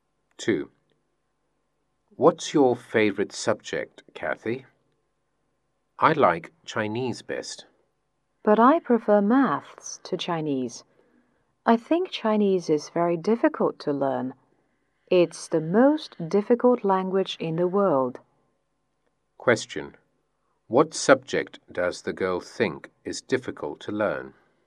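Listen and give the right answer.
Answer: Chinese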